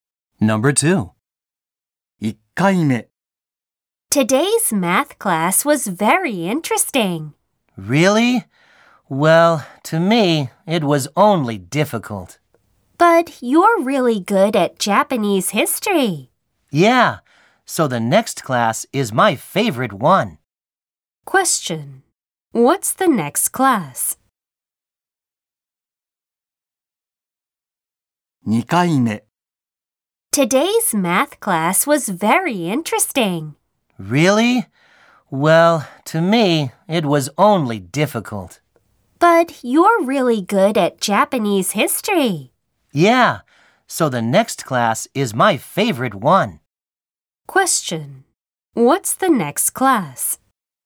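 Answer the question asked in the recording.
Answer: Japanese history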